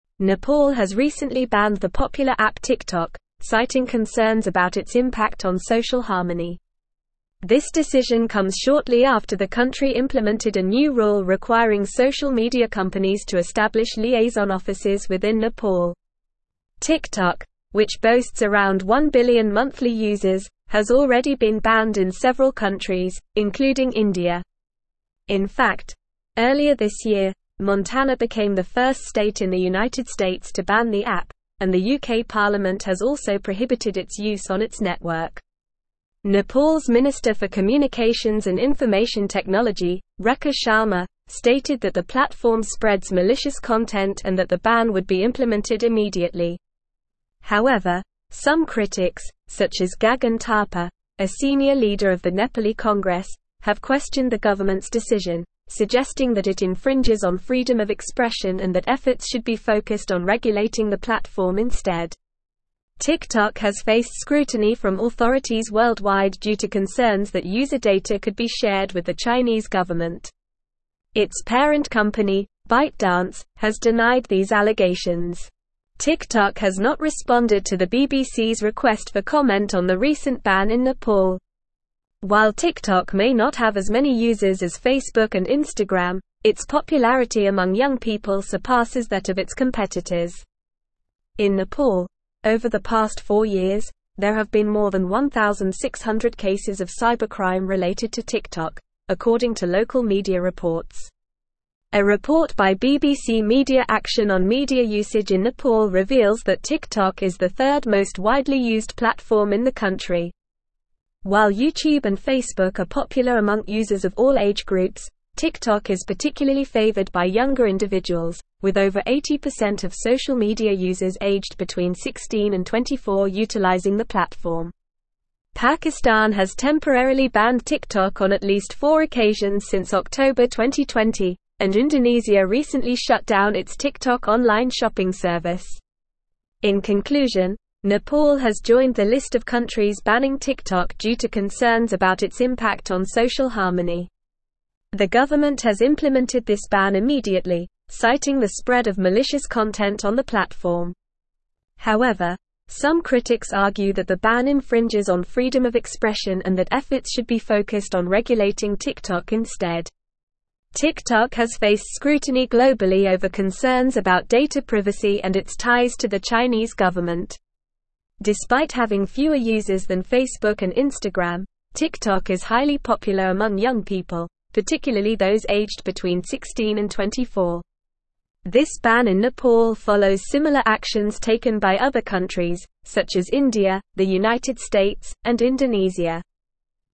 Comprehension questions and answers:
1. Nepal has recently banned the popular app (1)______, citing concerns about its impact on social harmony.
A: TikTok

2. This decision (2)______ shortly after the country implemented a new rule requiring social media companies to establish liaison (3)______ within Nepal.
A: comes

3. This decision (2)______ shortly after the country implemented a new rule requiring social media companies to establish liaison (3)______ within Nepal.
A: offices

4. In fact, earlier this year, Montana became the first state in the United States to ban the app, and the UK Parliament has also (4)______ its use on its network.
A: prohibited

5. However, some critics, such as (5)______ Thapa, a senior leader of the (6)______ Congress, have (7)______ the government's decision, suggesting that it infringes on freedom of expression and that efforts should be focused on regulating the platform instead.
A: Gagan

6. However, some critics, such as (5)______ Thapa, a senior leader of the (6)______ Congress, have (7)______ the government's decision, suggesting that it infringes on freedom of expression and that efforts should be focused on regulating the platform instead.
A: Nepali

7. However, some critics, such as (5)______ Thapa, a senior leader of the (6)______ Congress, have (7)______ the government's decision, suggesting that it infringes on freedom of expression and that efforts should be focused on regulating the platform instead.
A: questioned

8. TikTok has not responded to the BBC's request for comment on the (8)______ ban in Nepal.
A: recent

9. In Nepal, over the past four years, there have been more than 1,600 cases of cybercrime related to TikTok, according to (9)______ media (10)______.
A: local

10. In Nepal, over the past four years, there have been more than 1,600 cases of cybercrime related to TikTok, according to (9)______ media (10)______.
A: reports

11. Pakistan has temporarily banned TikTok on at least four occasions since October 2020, and Indonesia recently shut down its TikTok (11)______ shopping service.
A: online

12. In conclusion, Nepal has (12)______ the list of countries banning TikTok due to concerns about its (13)______ on social harmony.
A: joined

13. In conclusion, Nepal has (12)______ the list of countries banning TikTok due to concerns about its (13)______ on social harmony.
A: impact

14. The government has implemented this ban immediately, citing the spread of malicious (14)______ on the platform.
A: content

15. Despite (15)______ fewer users than Facebook and Instagram, TikTok is highly popular among young people, particularly those aged between 16 and 24.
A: having

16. This ban in Nepal follows similar actions taken by other countries, such as (16)______, the United States, and Indonesia.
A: India

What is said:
Nepal has recently banned the popular app TikTok, citing concerns about its impact on social harmony. This decision comes shortly after the country implemented a new rule requiring social media companies to establish liaison offices within Nepal. TikTok, which boasts around one billion monthly users, has already been banned in several countries, including India. In fact, earlier this year, Montana became the first state in the United States to ban the app, and the UK Parliament has also prohibited its use on its network. Nepal's Minister for Communications and Information Technology, Rekha Sharma, stated that the platform spreads malicious content and that the ban would be implemented immediately. However, some critics, such as Gagan Thapa, a senior leader of the Nepali Congress, have questioned the government's decision, suggesting that it infringes on freedom of expression and that efforts should be focused on regulating the platform instead.
TikTok has faced scrutiny from authorities worldwide due to concerns that user data could be shared with the Chinese government. Its parent company, ByteDance, has denied these allegations. TikTok has not responded to the BBC's request for comment on the recent ban in Nepal. While TikTok may not have as many users as Facebook and Instagram, its popularity among young people surpasses that of its competitors. In Nepal, over the past four years, there have been more than 1,600 cases of cybercrime related to TikTok, according to local media reports. A report by BBC Media Action on media usage in Nepal reveals that TikTok is the third most widely used platform in the country. While YouTube and Facebook are popular among users of all age groups, TikTok is particularly favored by younger individuals, with over 80% of social media users aged between 16 and 24 utilizing the platform. Pakistan has temporarily banned TikTok on at least four occasions since October 2020, and Indonesia recently shut down its TikTok online shopping service.
In conclusion, Nepal has joined the list of countries banning TikTok due to concerns about its impact on social harmony. The government has implemented this ban immediately, citing the spread of malicious content on the platform. TikTok has faced scrutiny globally over concerns about data privacy and its ties to the Chinese government. Despite having fewer users than Facebook and Instagram, TikTok is highly popular among young people, particularly those aged between 16 and 24. This ban in Nepal follows similar actions taken by other countries, such as India, the United States, and Indonesia.

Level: Level 4